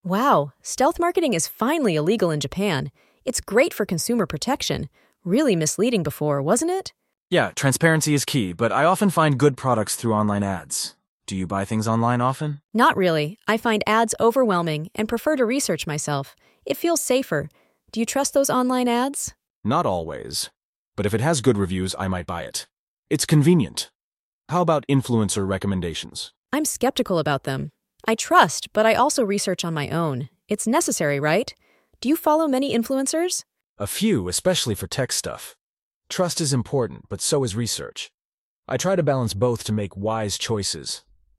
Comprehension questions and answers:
Select 'Yes' (T) if each of the following questions matches the content of the conversation, and 'No' (F) if it does not.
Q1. Was stealth marketing illegal in Japan before?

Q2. Does the woman trust online ads?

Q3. Does the man always buy products recommended by influencers?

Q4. Does the man say he follows many influencers?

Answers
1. No
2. No
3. No
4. No

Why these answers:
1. 女性の最初のセリフから、以前はステルスマーケティングが日本で違法ではなかったことが示唆されています。
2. 女性はオンライン広告には慎重で、自分自身で商品や情報を調査することを好んでいます。
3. 男性は必ずしも常にインフルエンサーのお勧め商品を購入するわけではなく、製品のレビューを確認し、信頼と調査をバランス良く取り入れて賢い選択をしようとしています。
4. 男性は「数人」のインフルエンサをフォローしていますが、多くとは言っていません。